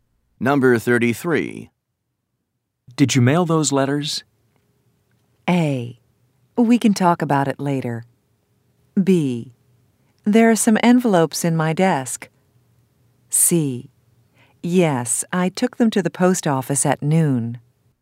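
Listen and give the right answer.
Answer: C: Yes, I took them to the post office at noon.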